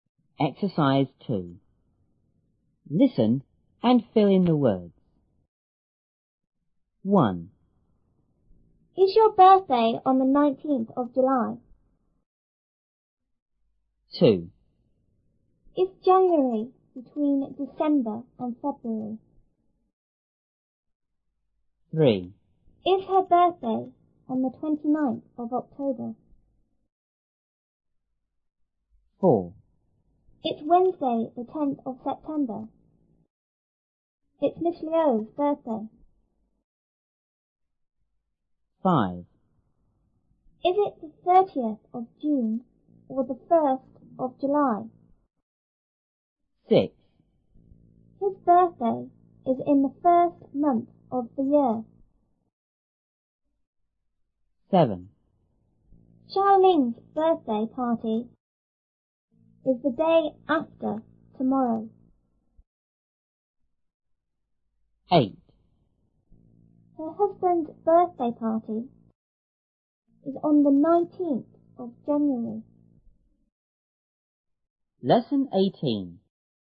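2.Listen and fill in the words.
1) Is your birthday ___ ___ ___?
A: on 19th July

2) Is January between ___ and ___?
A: December, February

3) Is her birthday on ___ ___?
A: 29th October

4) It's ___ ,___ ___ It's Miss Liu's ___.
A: Wednesday, 10th September, birthday

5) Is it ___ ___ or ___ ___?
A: 30th June, 1st July

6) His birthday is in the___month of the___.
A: first, year

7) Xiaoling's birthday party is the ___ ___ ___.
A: day after tomorrow

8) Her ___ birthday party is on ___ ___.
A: husband's, 19th January

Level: 初中英语广州版1B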